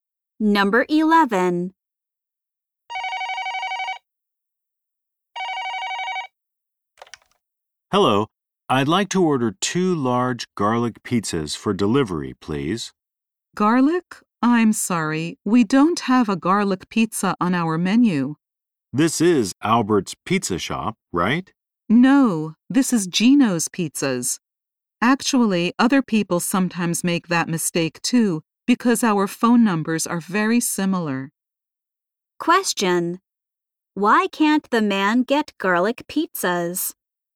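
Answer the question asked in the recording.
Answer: He called the wrong pizza shop.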